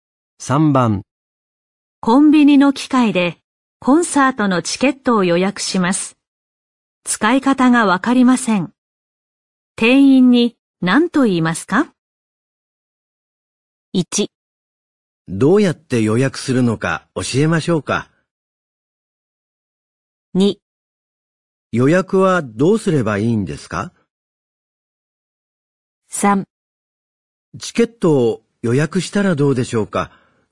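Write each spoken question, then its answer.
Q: 店員に何と言いますか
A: 2: 予約はどうすればいいんですか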